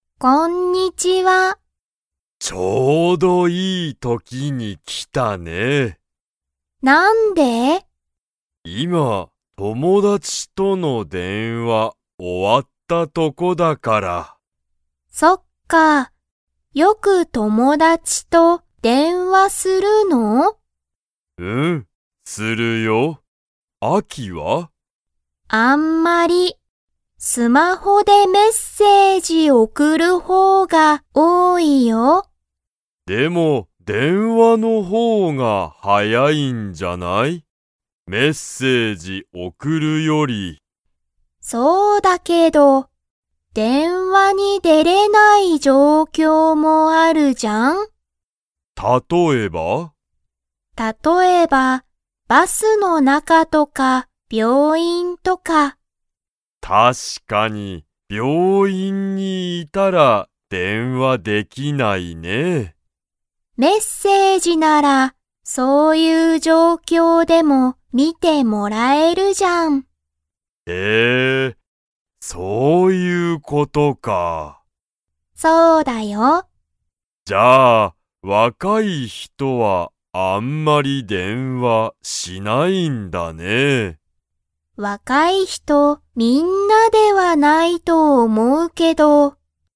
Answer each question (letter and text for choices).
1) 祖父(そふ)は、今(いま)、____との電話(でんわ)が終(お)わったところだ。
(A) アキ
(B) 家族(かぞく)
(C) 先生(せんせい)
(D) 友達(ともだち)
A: (D) 友達(ともだち)

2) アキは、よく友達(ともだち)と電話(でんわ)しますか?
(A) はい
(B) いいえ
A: (B) いいえ

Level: Level 2